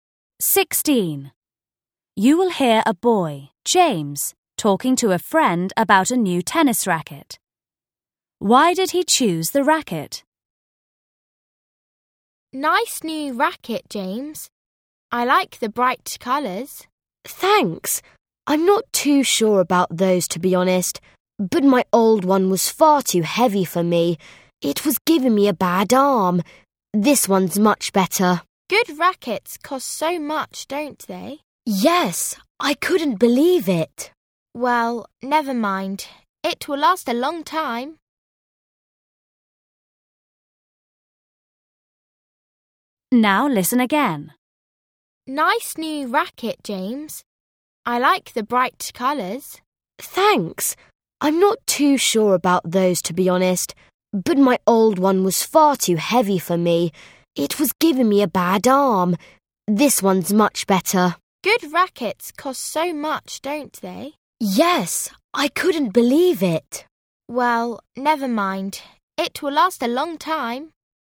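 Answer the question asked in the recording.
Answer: It is lighter than his old one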